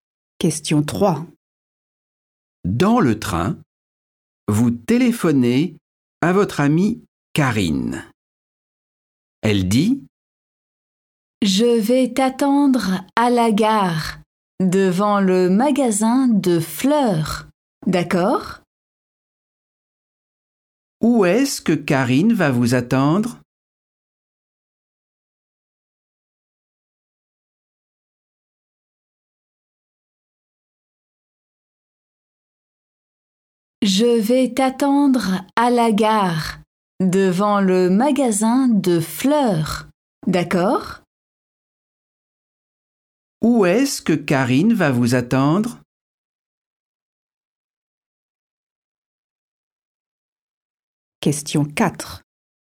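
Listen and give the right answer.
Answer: à la gare, devant le magasin de fleurs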